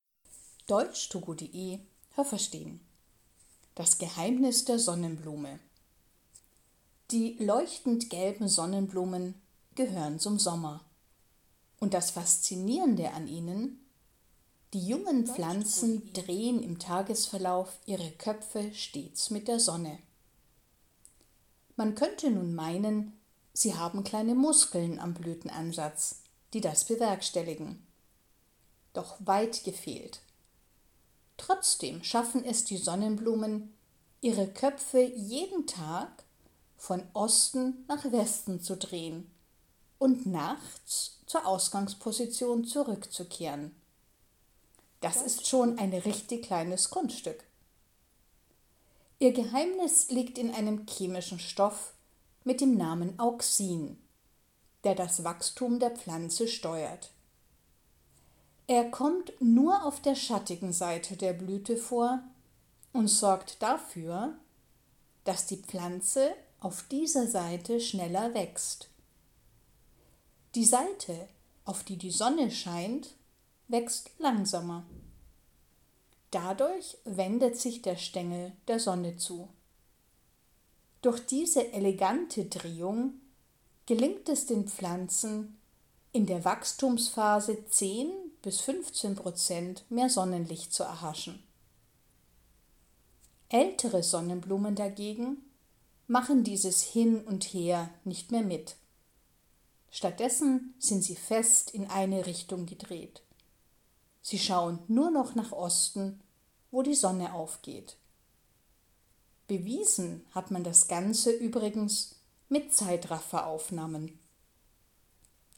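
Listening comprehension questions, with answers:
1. Alle Sonnenblumen drehen ihre Köpfe mit der Sonne.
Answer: falsch

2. Nur kleine Sonnenblumen haben Muskeln am Blütenansatz.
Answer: falsch

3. Der chemische Stoff Auxin bestimmt das Wachstum der Pflanzen.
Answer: richtig

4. Auxin kommt nur auf der schattigen Seite der Blüte vor und ist dafür verantwortlich, dass die Pflanze auf der Sonnenseite schneller wächst.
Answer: falsch

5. Weil die Pflanze auf der Schattenseite schneller wächst, dreht sich der Stängel zur Sonne.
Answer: richtig

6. Diese Drehung ermöglicht es, dass die Pflanze beim Wachsen bis zu 15 Prozent mehr Sonnenlicht bekommt.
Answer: richtig

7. Wenn Sonnenblumen ihre endgültige Größe erreicht haben, schauen sie nur noch nach Osten.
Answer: richtig

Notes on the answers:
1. Nur junge Sonnenblumen machen das.
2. Keine Sonnenblume hat Muskeln.
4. Die Pflanze wächst deshalb auf der Schattenseite schneller.

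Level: Hörtexte C (schwer)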